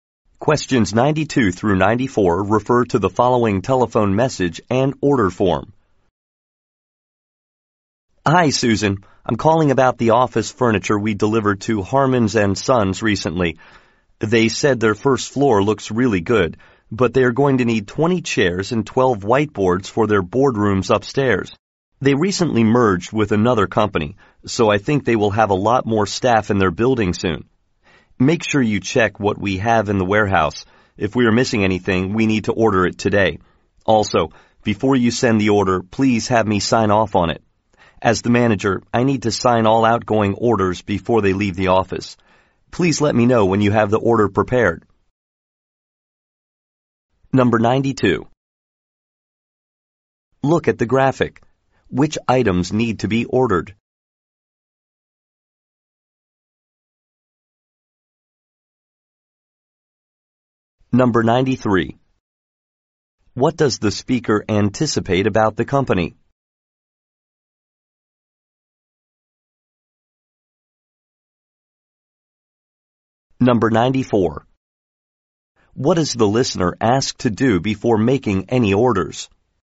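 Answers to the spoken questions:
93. It will soon have more staff.
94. Have the manager sign off on it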